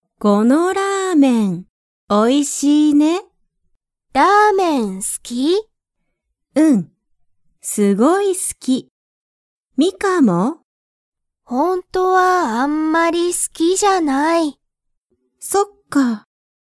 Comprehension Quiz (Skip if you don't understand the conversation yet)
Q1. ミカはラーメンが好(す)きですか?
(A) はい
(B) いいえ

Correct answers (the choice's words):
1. いいえ

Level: Level 1